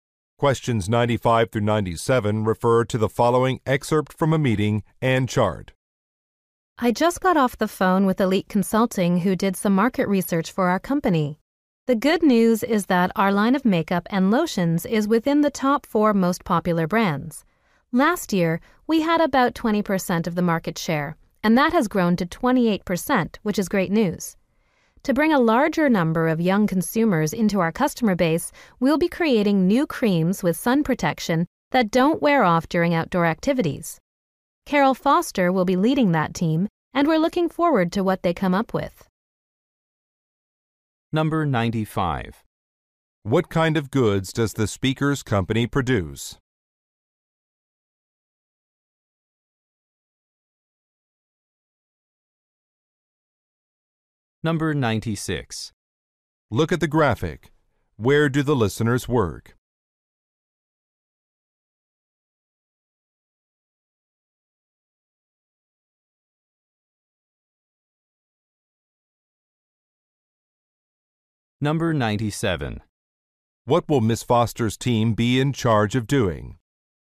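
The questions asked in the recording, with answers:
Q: What kind of goods does the speaker's company produce?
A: Cosmetics (makeup and lotions)

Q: What will Ms. Foster's team be in charge of doing?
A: Creating new sun-protection creams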